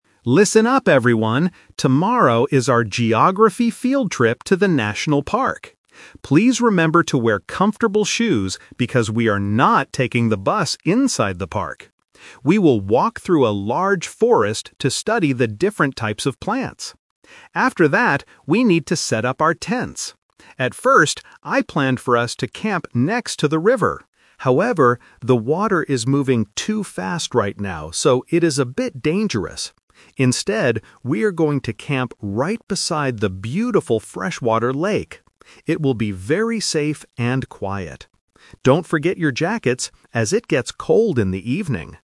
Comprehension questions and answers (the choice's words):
Listen to a teacher talking to her students about a field trip. Choose the correct answer (A, B, or C) for each question.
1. How will the students travel inside the National Park?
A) By bus.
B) By walking.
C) By boat.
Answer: By walking.

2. Where are the students going to camp?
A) Next to the river.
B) Inside the forest.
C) Beside the lake.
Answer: Beside the lake.

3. Why did the teacher change the camping location?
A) Because the river is dangerous right now.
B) Because the lake is much closer.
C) Because the forest is too cold.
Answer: Because the river is dangerous right now.

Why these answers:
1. Why B is correct: The teacher says, "We will walk through a large forest..." Why A is a trap: The bus is mentioned in the audio, but the teacher explicitly says, "we are not taking the bus inside the park." Why C is wrong: A boat is a plausible way to travel on water, but it is never mentioned in the speech.
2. Why C is correct: This is the A2 "Twist." The teacher confirms the final plan: "Instead, we are going to camp right beside the beautiful freshwater lake." Why A is a trap: The teacher originally planned to camp next to the river ("At first, I planned for us to camp next to the river"), but changed her mind. Why B is wrong: The forest is where they will walk to study plants, not where they will camp.
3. Why A is correct: The teacher explains the reason for the change: "the water is moving too fast right now, so it is a bit dangerous." Why B is wrong: The distance (being closer) is not mentioned as a reason. Why C is a trap: The teacher mentions that it gets cold in the evening (so they need jackets), but the cold weather is not the reason they changed the camping spot.

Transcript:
Tomorrow is our geography field trip to the National Park. Please remember to wear comfortable shoes because we are not taking the bus inside the park. We will walk through a large forest to study the different types of plants. After that, we need to set up our tents. At first, I planned for us to camp next to the river. However, the water is moving too fast right now, so it is a bit dangerous. Instead, we are going to camp right beside the beautiful freshwater lake. It will be very safe and quiet. Don't forget your jackets, as it gets cold in the evening!